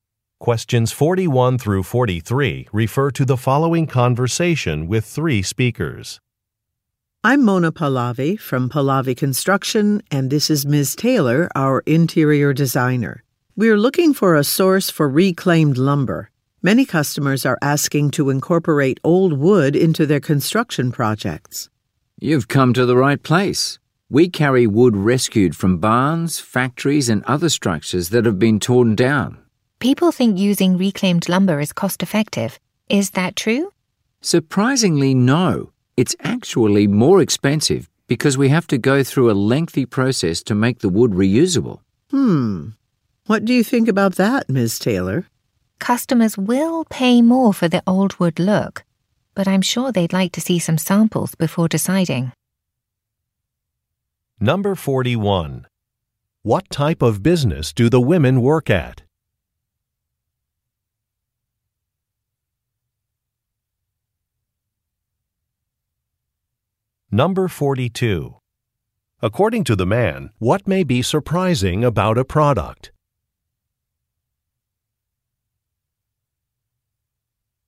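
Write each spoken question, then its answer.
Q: What type of business do the women work at?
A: A construction company

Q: According to the man, what may be surprising about a product?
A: Reclaimed lumber is more expensive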